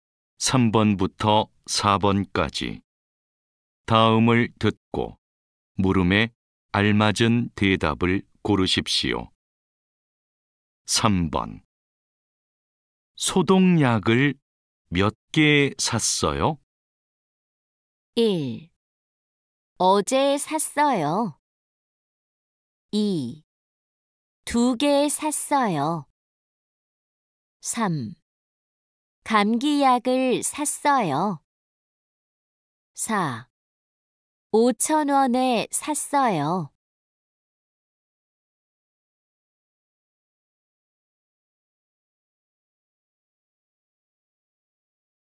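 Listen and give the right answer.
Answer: 2: 두 개 샀어요.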